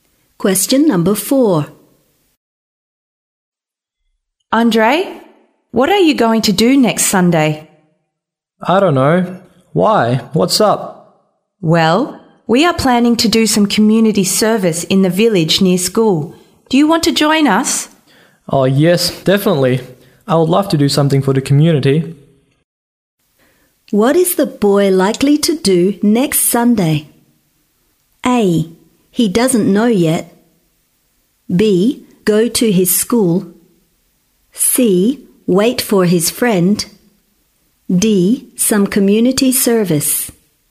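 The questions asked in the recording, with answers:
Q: What is the boy likely to do next Sunday?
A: D: Some community service.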